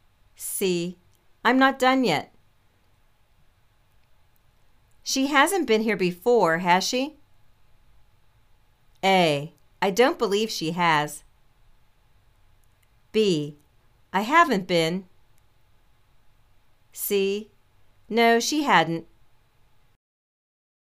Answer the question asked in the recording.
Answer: I don't believe she has.